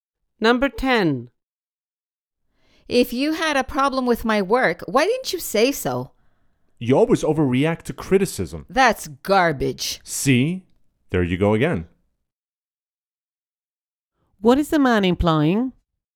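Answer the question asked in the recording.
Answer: The woman is overreacting to criticism again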